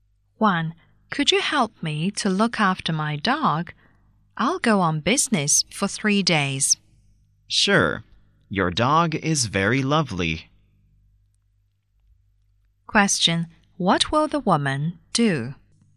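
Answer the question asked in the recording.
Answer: Look after the man's dog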